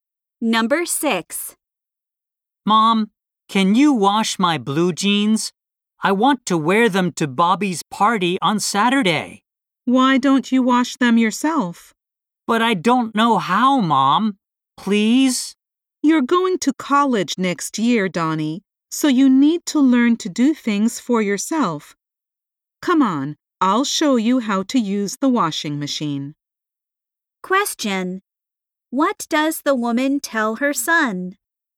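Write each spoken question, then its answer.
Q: What does the woman tell her son?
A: He needs to learn to do things himself, like washing his clothes.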